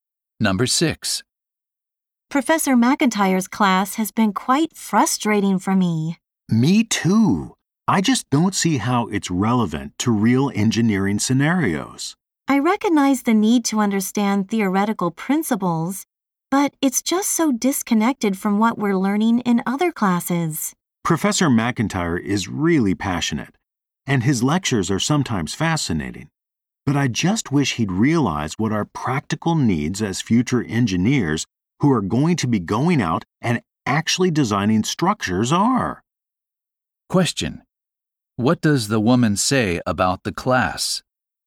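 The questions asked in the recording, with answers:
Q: What does the woman say about the class?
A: It is not practical enough for future engineers.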